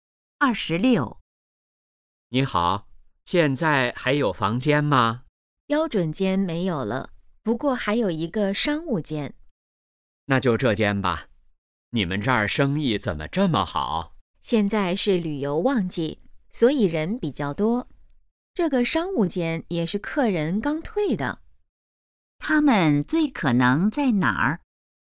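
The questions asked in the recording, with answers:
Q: 他们最可能在哪儿?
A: 宾馆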